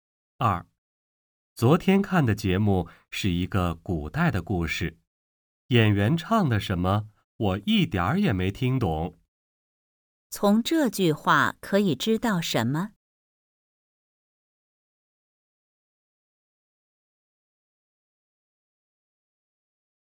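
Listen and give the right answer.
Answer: 他一点儿也没听懂演员唱的什么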